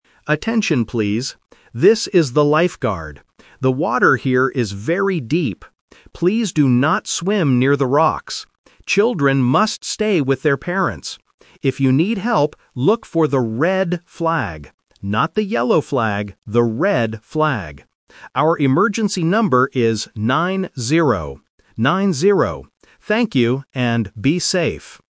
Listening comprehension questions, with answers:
Listen to the lifeguard's announcement and choose the correct answer (A, B, or C).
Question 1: Where should people NOT swim?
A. Near the rocks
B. Near the boats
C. Near the sand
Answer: Near the rocks

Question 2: What color is the flag for help?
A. Yellow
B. Red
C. Green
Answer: Red

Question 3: What is the emergency number?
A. 9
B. 19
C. 90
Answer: 90

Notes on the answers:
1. The lifeguard explicitly gives the instruction: "Please do not swim near the rocks." Options (B) and (C) are plausible things found at a beach but are not mentioned in the audio.
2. The lifeguard says, "look for the red flag." Option (A) is the trap because the word "yellow" is mentioned, but in a negative sentence to correct a common mistake: "Not the yellow flag, the red flag." Option (C) is not mentioned.
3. The lifeguard states the number is 90, and confirms it by saying "Nine-zero." Option (B) is a classic pronunciation trap for students who confuse "-ty" (90) with "-teen" (19). Option (A) is the trap for catching just the single digit.

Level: A1

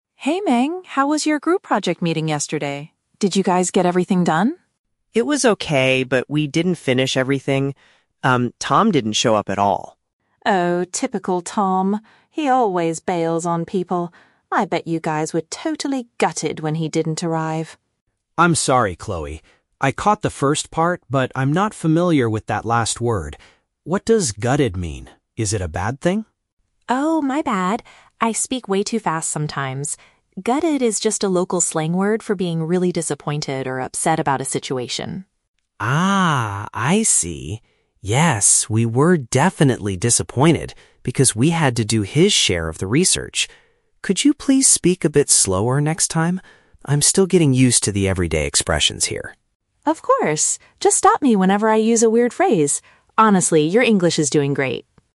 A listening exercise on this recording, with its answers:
Listen to the conversation between an international student and his native classmate. Read the questions below and choose the correct answer (A, B, or C) for each.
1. Why was Minh's group unable to complete their project tasks yesterday?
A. They did not have enough time to research the topic.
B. One of the team members failed to attend the gathering.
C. They were too frustrated with the professor's instructions.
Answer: One of the team members failed to attend the gathering.

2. What is the meaning of the slang word that Chloe uses?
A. Feeling a strong sense of sadness or disappointment.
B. Running away from your academic responsibilities.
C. Feeling extremely exhausted after studying all day.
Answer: Feeling a strong sense of sadness or disappointment.

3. What does Minh ask his classmate to do for him in the future?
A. Teach him a new local expression every single day.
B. Do some of the research for his upcoming assignment.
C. Decrease her speaking pace during their conversations.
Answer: Decrease her speaking pace during their conversations.

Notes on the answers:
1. The Key (Correct): Minh explains that they didn't finish because "Tom didn't show up at all." (Paraphrased: didn't show up = failed to attend; meeting = gathering). The Trap: Option (A) is a very common reason for not finishing a project, but running out of time is not mentioned. Option (C) uses the word "frustrated" which is similar to "disappointed", but they were upset about Tom, not the professor's instructions.
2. The Key (Correct): Chloe explains that the word "gutted" means "being really disappointed or upset about a situation." (Paraphrased: disappointed or upset = strong sense of sadness or disappointment). The Trap: Option (B) describes what Tom did ("he always bails on people"), but this is the definition of "bailing", not "gutted". Not mentioned: Option (C) is a common meaning for other English slang words (like "knackered" or "beat"), but it is not the definition discussed in this audio.
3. The Key (Correct): Minh politely asks, "Could you please speak a bit slower next time?" (Paraphrased: speak a bit slower = decrease her speaking pace). The Trap: Option (B) is a trap. Minh mentions "research" in the audio, but he says he had to do Tom's share of the research, he does not ask Chloe to do it for him. Not mentioned: Option (A) is plausible for an international student wanting to learn, but Minh never asks her to teach him a new expression every day; he just wants her to slow down.

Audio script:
Chloe: Hey Minh, how was your group project meeting yesterday? Did you guys get everything done?
Minh: It was okay, but we didn't finish everything. Um, Tom didn't show up at all.
Chloe: Oh, typical Tom. He always bails on people. I bet you guys were totally gutted when he didn't arrive.
Minh: I'm sorry, Chloe. I caught the first part, but I'm not familiar with that last word. What does "gutted" mean? Is it a bad thing?
Chloe: Oh, my bad! I speak way too fast sometimes. "Gutted" is just a local slang word for being really disappointed or upset about a situation.
Minh: Ah, I see! Yes, we were definitely disappointed because we had to do his share of the research. Could you please speak a bit slower next time? I'm still getting used to the everyday expressions here.
Chloe: Of course! Just stop me whenever I use a weird phrase. Honestly, your English is doing great.

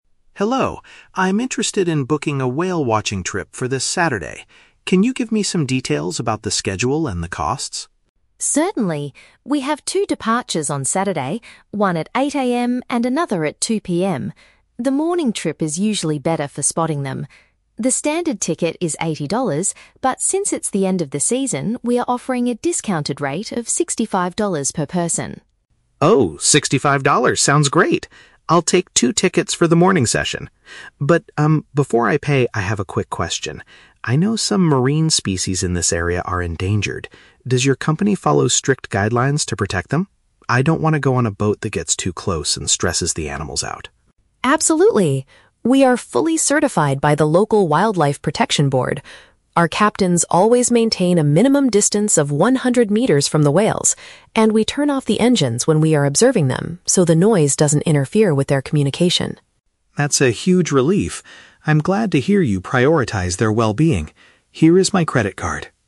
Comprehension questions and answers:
Listen to a conversation between a tourist and a travel agent. Choose the best answer (A, B, or C) for each question.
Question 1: Why is the travel agency offering a lower ticket price?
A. Because the tourist is buying multiple tickets at once.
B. Because the whale-watching period for the year is almost over.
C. Because the morning departures are usually less popular.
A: Because the whale-watching period for the year is almost over.

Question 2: What is the tourist's main concern before paying for the trip?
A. She wants to ensure the activity does not harm the marine life.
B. She is worried that the boat will not get close enough to see the whales.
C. She wants to make sure the boat's engine is safe and will not break down.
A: She wants to ensure the activity does not harm the marine life.

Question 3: How does the company make sure they do not disturb the whales?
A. They only allow a maximum of 100 people on the boat at a time.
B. They feed the whales from a distance to keep them calm.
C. They stop the boat's motors to keep the environment quiet.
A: They stop the boat's motors to keep the environment quiet.

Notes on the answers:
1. The agent says the price is $65 instead of $80 "since it's the end of the season". Option B paraphrases this as the period being "almost over".
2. The tourist asks if the company follows guidelines to protect the endangered species because she doesn't want to go on a boat that "stresses the animals out". Option A perfectly summarizes this concern.
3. The agent explains that they "turn off the engines" so the noise doesn't interfere with the whales. Option C paraphrases this as stopping the "motors" to keep the environment "quiet".

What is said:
Tourist: Hello, I'm interested in booking a whale-watching trip for this Saturday. Can you give me some details about the schedule and the costs?
Agent: Certainly! We have two departures on Saturday: one at 8:00 AM and another at 2:00 PM. The morning trip is usually better for spotting them. The standard ticket is $80, but since it's the end of the season, we are offering a discounted rate of $65 per person.
Tourist: Oh, $65 sounds great. I'll take two tickets for the morning session. But, um, before I pay, I have a quick question. I know some marine species in this area are endangered. Does your company follow strict guidelines to protect them? I don't want to go on a boat that gets too close and stresses the animals out.
Agent: Absolutely. We are fully certified by the local wildlife protection board. Our captains always maintain a minimum distance of 100 meters from the whales, and we turn off the engines when we are observing them so the noise doesn't interfere with their communication.
Tourist: That's a huge relief. I'm glad to hear you prioritize their well-being. Here is my credit card.

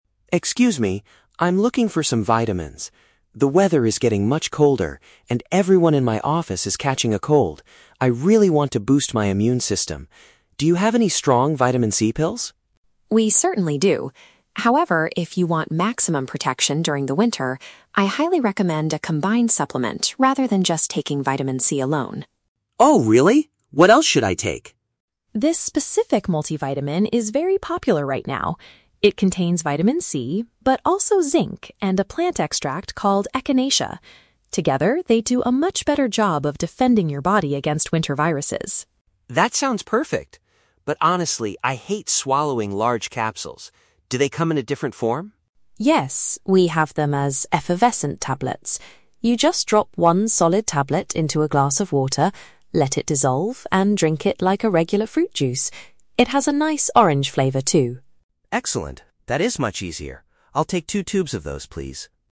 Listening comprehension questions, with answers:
Listen to a conversation between a customer and a pharmacist. For each question, choose the correct answer (A, B, or C).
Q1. Why does the customer want to buy vitamins today?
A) He is currently sick with a terrible winter cold.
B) He wants to protect his health as the temperature drops.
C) He needs to buy medicine for his sick coworkers.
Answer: He wants to protect his health as the temperature drops.

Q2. What does the pharmacist suggest the customer purchase?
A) A basic bottle of pure Vitamin C medicine.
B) A natural medicine made exclusively from plant leaves.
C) A product that contains several different health ingredients.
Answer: A product that contains several different health ingredients.

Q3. How is the customer supposed to consume these vitamins?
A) By swallowing a large pill after eating a meal.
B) By chewing them like an orange-flavored candy.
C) By mixing a solid tablet with a drinkable liquid.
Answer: By mixing a solid tablet with a drinkable liquid.

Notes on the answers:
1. The customer says, "The weather is getting much colder... I really want to boost my immune system." This means he wants to protect his health as the temperature drops. Option (A) is a trap; he says "everyone in my office is catching a cold," but he is not sick himself yet. Option (C) is a trap; he is buying the vitamins for himself to prevent getting sick, not for his coworkers.
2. The pharmacist recommends a "combined supplement" that contains Vitamin C, Zinc, and a plant extract (several different ingredients). Option (A) is a trap; the customer originally asked for pure Vitamin C, but the pharmacist advised against taking it "alone." Option (B) is a trap; a plant extract is included, but it is not the only ingredient (exclusively).
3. The pharmacist explains that he should "drop one solid tablet into a glass of water, let it dissolve, and drink it." This describes mixing a solid tablet with a drinkable liquid. Option (A) is a trap; the customer explicitly states, "I hate swallowing large capsules." Option (B) is a trap; it has an "orange flavor," but it is a drink, not a chewy candy.

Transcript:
Customer: Excuse me. I'm looking for some vitamins. The weather is getting much colder, and everyone in my office is catching a cold. I really want to boost my immune system. Do you have any strong Vitamin C pills?
Pharmacist: We certainly do. However, if you want maximum protection during the winter, I highly recommend a combined supplement rather than just taking Vitamin C alone.
Customer: Oh, really? What else should I take?
Pharmacist: This specific multivitamin is very popular right now. It contains Vitamin C, but also Zinc and a plant extract called Echinacea. Together, they do a much better job of defending your body against winter viruses.
Customer: That sounds perfect. But honestly, I hate swallowing large capsules. Do they come in a different form?
Pharmacist: Yes, we have them as effervescent tablets. You just drop one solid tablet into a glass of water, let it dissolve, and drink it like a regular fruit juice. It has a nice orange flavor too.

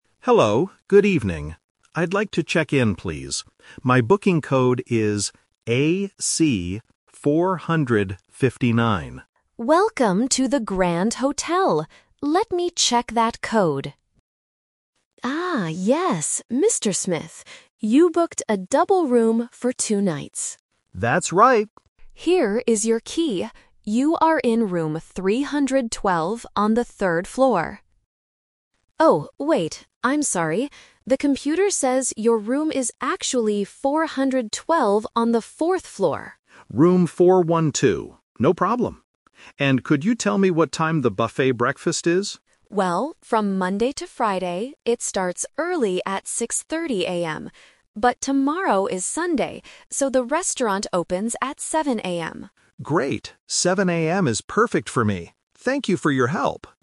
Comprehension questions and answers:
Listen to a conversation between a hotel guest and a receptionist. Choose the correct answer (A, B, or C) for each question.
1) How does the receptionist find the guest's reservation?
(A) By looking at his passport.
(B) By typing his phone number.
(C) By checking his booking code.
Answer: By checking his booking code.

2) Which room will the guest stay in?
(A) Room 312.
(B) Room 412.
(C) Room 459.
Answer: Room 412.

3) What time does the buffet breakfast open tomorrow?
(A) At 6:30 AM.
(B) At 7:00 AM.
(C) At 10:00 AM.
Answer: At 7:00 AM.

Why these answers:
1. The guest says, "My booking code is AC-459," and the receptionist replies, "Let me check that code." Options (A) and (B) are common ways to check in at a hotel in real life, but they are not mentioned in this audio.
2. This is The Twist. The receptionist first says room 312, but then corrects herself: "Oh, wait, I'm sorry... your room is actually 412." Option (A) is the trap (the first room mentioned). Option (C) is a trap using the numbers from the booking code (AC-459).
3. This is another Twist. The receptionist mentions that the breakfast usually starts at 6:30 AM, but "tomorrow is Sunday, so the restaurant opens at 7:00 AM." Option (A) is the trap for weekdays. Option (C) is not mentioned.

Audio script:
Guest: Hello, good evening. I'd like to check in, please. My booking code is AC-459.
Receptionist: Welcome to the Grand Hotel! Let me check that code... Ah, yes, Mr. Smith. You booked a double room for two nights.
Guest: That's right.
Receptionist: Here is your key. You are in room 312 on the third floor... Oh, wait, I'm sorry. The computer says your room is actually 412 on the fourth floor.
Guest: Room 412. No problem. And could you tell me what time the buffet breakfast is?
Receptionist: Well, from Monday to Friday, it starts early at 6:30 AM. But tomorrow is Sunday, so the restaurant opens at 7:00 AM.

